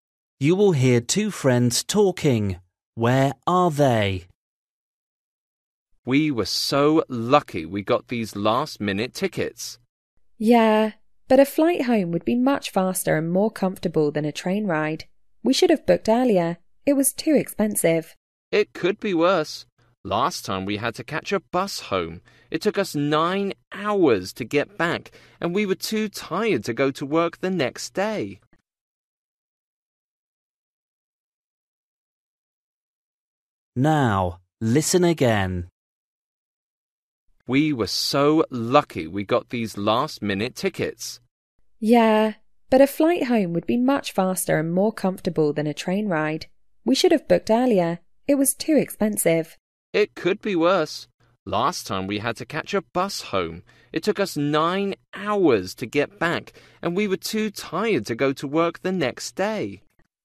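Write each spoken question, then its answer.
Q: Where are they?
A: On a train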